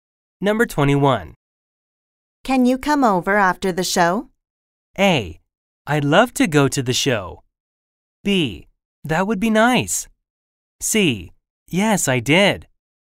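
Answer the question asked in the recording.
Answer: B: That would be nice.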